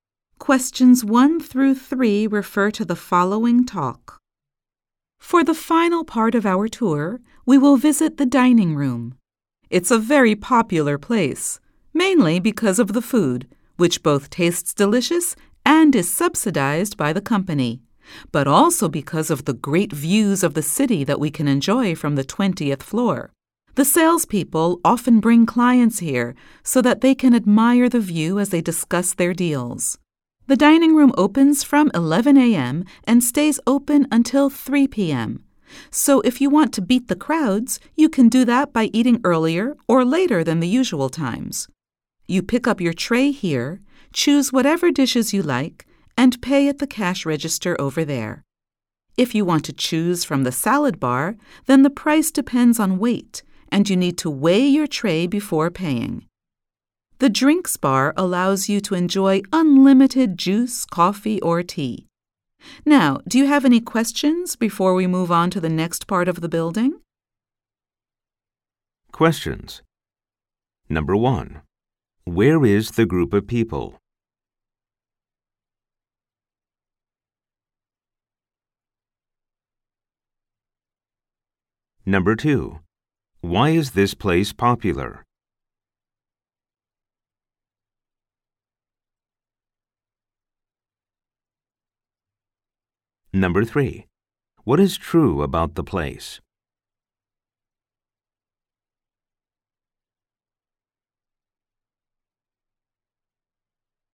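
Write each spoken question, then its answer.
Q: Where is the group of people?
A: On a tour of a company building, in the dining room

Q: Why is this place popular?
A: Because the food is delicious and subsidized, and it has great city views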